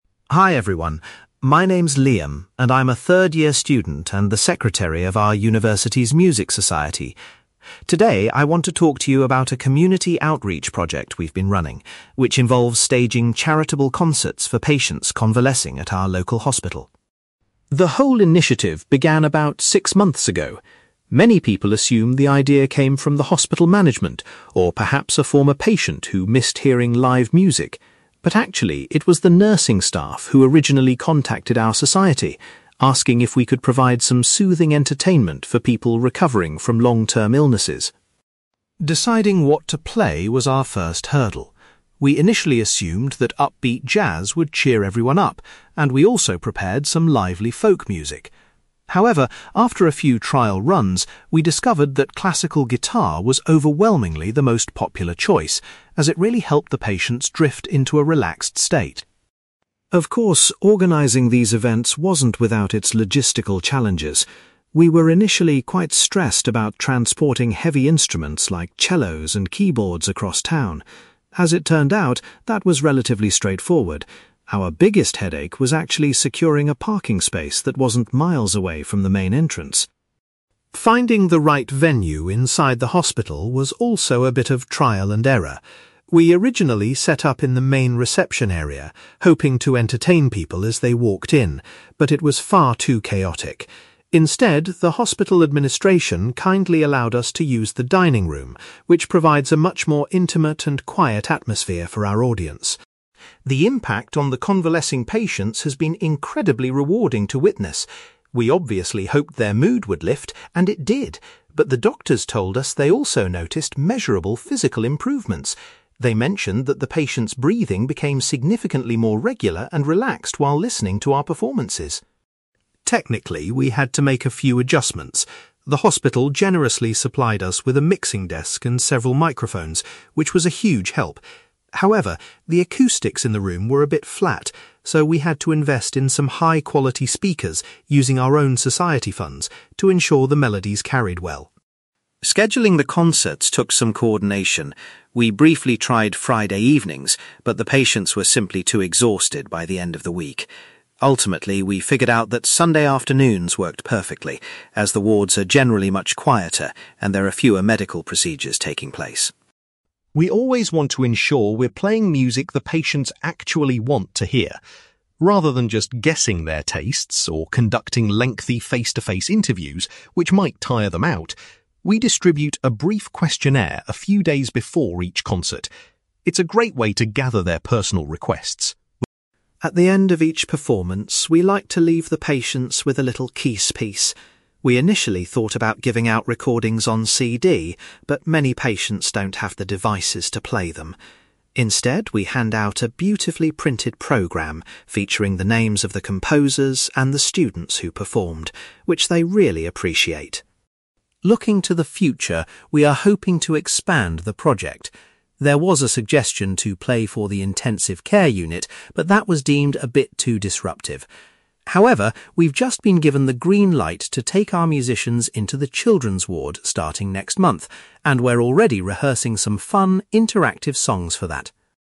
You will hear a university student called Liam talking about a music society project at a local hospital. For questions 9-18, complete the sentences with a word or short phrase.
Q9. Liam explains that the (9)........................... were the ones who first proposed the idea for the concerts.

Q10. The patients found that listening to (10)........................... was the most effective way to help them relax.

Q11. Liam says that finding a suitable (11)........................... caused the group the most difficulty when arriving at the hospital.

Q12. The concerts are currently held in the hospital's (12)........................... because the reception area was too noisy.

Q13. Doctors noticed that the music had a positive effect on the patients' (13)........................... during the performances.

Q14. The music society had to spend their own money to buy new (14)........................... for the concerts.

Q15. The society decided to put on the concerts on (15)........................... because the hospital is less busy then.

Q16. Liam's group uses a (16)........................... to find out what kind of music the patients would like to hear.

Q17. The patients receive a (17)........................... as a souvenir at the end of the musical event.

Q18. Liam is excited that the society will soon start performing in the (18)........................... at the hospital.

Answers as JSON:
{"9": "nursing staff", "10": "classical guitar", "11": "parking space", "12": "dining room", "13": "breathing", "14": "speakers", "15": "Sunday afternoons", "16": "questionnaire", "17": "printed programme", "18": "children's ward"}

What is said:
Liam: Hi everyone, my name is Liam, and I'm a third-year student and the secretary of our university's music society. Today I want to talk to you about a community outreach project we've been running, which involves staging charitable concerts for patients convalescing at our local hospital.
The whole initiative began about six months ago. Many people assume the idea came from the hospital management, or perhaps a former patient who missed hearing live music. But actually, it was the nursing staff who originally contacted our society, asking if we could provide some soothing entertainment for people recovering from long-term illnesses.
Deciding what to play was our first hurdle. We initially assumed that upbeat jazz would cheer everyone up, and we also prepared some lively folk music. However, after a few trial runs, we discovered that classical guitar was overwhelmingly the most popular choice, as it really helped the patients drift into a relaxed state.
Of course, organising these events wasn't without its logistical challenges. We were initially quite stressed about transporting heavy instruments like cellos and keyboards across town. As it turned out, that was relatively straightforward; our biggest headache was actually securing a parking space that wasn't miles away from the main entrance.
Finding the right venue inside the hospital was also a bit of trial and error. We originally set up in the main reception area, hoping to entertain people as they walked in. But it was far too chaotic. Instead, the hospital administration kindly allowed us to use the dining room, which provides a much more intimate and quiet atmosphere for our audience.
The impact on the convalescing patients has been incredibly rewarding to witness. We obviously hoped their mood would lift, and it did. But the doctors told us they also noticed measurable physical improvements. They mentioned that the patients' breathing became significantly more regular and relaxed while listening to our performances.
Technically, we had to make a few adjustments. The hospital generously supplied us with a mixing desk and several microphones, which was a huge help. However, the acoustics in the room were a bit flat, so we had to invest in some high-quality speakers using our own society funds to ensure the melodies carried well.
Scheduling the concerts took some coordination. We briefly tried Friday evenings, but the patients were simply too exhausted by the end of the week. Ultimately, we figured out that Sunday afternoons worked perfectly, as the wards are generally much quieter and there are fewer medical procedures taking place.
We always want to ensure we're playing music the patients actually want to hear. Rather than just guessing their tastes, or conducting lengthy face-to-face interviews which might tire them out, we distribute a brief questionnaire a few days before each concert. It's a great way to gather their personal requests.
At the end of each performance, we like to leave the patients with a little keepsake. We initially thought about giving out recordings on CD, but many patients don't have the devices to play them. Instead, we hand out a beautifully printed programme featuring the names of the composers and the students who performed, which they really appreciate.
Looking to the future, we are hoping to expand the project. There was a suggestion to play for the intensive care unit, but that was deemed a bit too disruptive. However, we've just been given the green light to take our musicians into the children's ward starting next month, and we're already rehearsing some fun, interactive songs for that!

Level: B2 English Listening Exercise